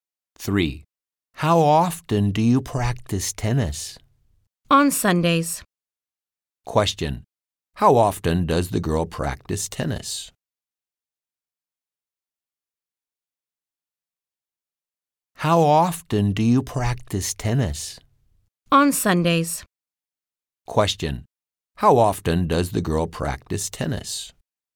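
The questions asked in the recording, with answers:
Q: Question, how often does the girl practice tennis?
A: On Sundays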